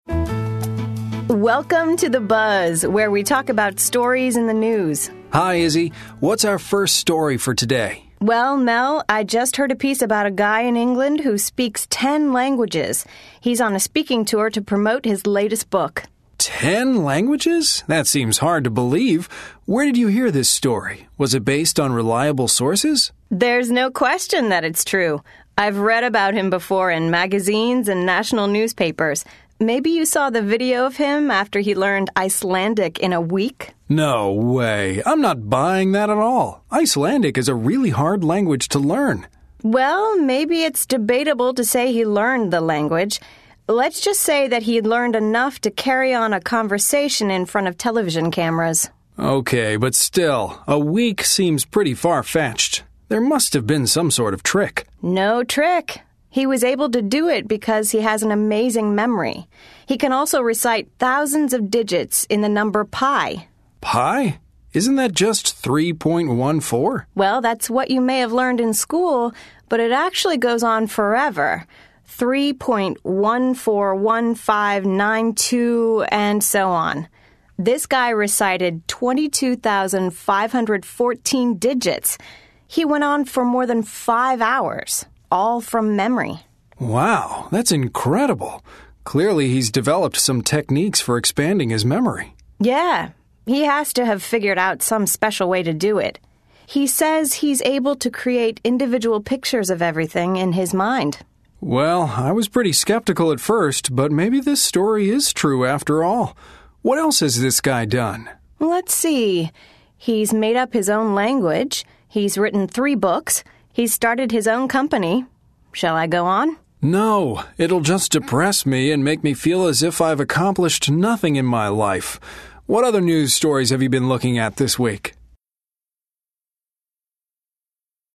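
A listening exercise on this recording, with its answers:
Listen to the conversation. Then choose the correct answers.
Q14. Why does the woman think the story is true?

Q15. In the beginning, what is Mel's response to the story in the beginning?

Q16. Why does Izzy say the man's ability to speak Icelandic is debatable?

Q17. What is Izzy's view of the story?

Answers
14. She has read about him before in magazines and national newspapers.
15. He finds it hard to believe.
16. He only learned enough to carry on a conversation in front of television cameras.
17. She believes it is true.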